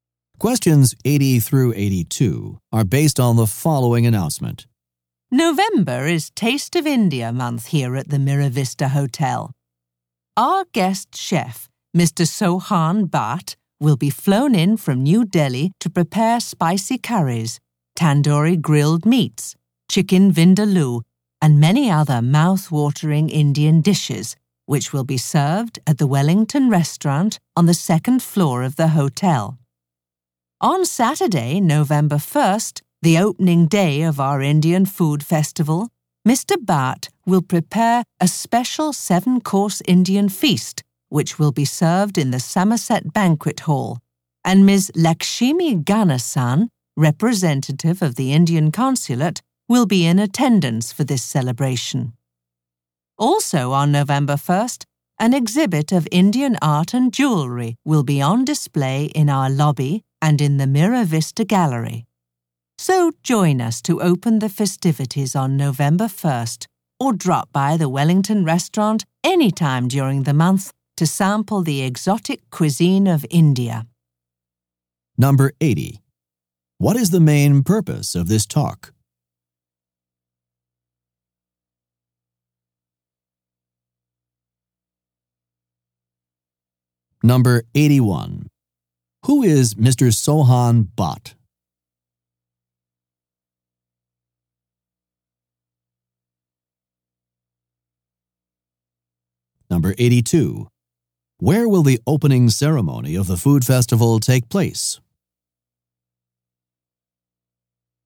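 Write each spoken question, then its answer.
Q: What is the main purpose of this talk?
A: To announce the hotel's Taste of India food festival

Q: Who is Mr. Sohan Bhatt?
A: A guest chef from New Delhi

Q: Where will the opening ceremony of the food festival take place?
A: In the Somerset Banquet Hall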